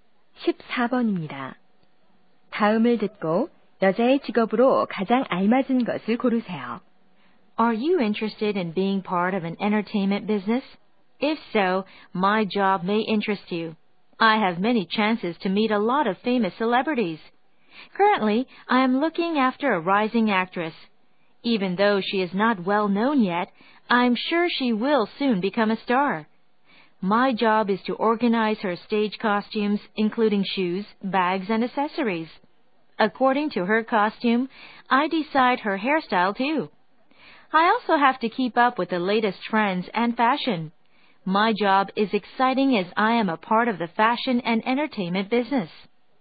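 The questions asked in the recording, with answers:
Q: 다음을 듣고 여자의 직업으로 가장 알맞은 것을 고르세요.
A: 스타일리스트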